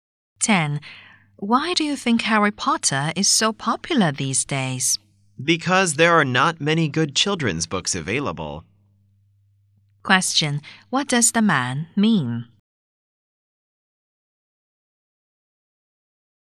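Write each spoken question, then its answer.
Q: What does the man mean?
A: There are few good children's books, so Harry Potter is popular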